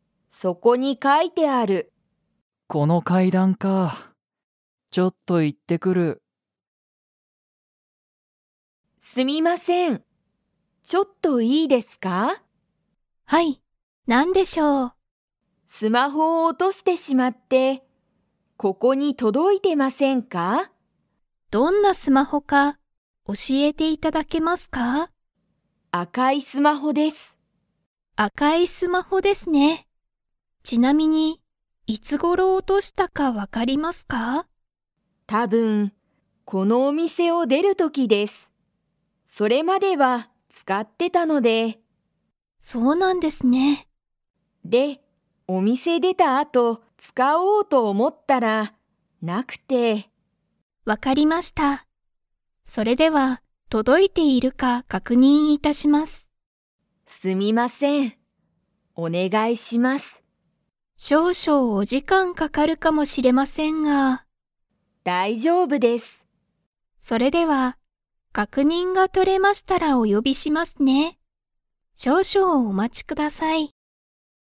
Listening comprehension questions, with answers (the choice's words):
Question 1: 松井まついさんは、 スマホを落おとした。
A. 赤あかい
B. 大おおきい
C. 高たかい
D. 古ふるい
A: 赤あかい

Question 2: 松井まついさんは、お店みせを出でた後あとスマホを使つかいましたか?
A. はい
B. いいえ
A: いいえ

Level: Level 4